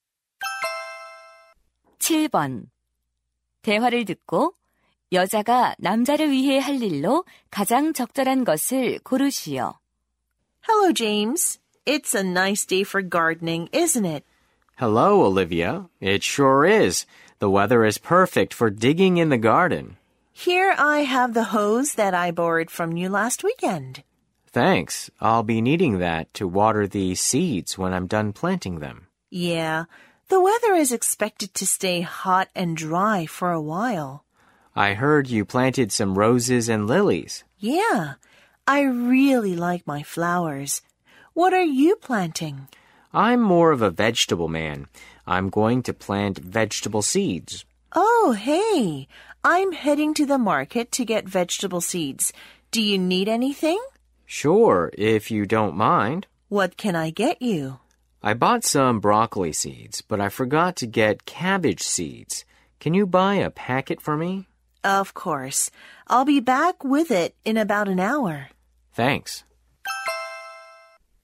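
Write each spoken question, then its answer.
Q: 대화를 듣고 여자가 남자를 위해 할 일로 가장 적절한 것을 고르시오.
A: 양배추 씨앗 사 오기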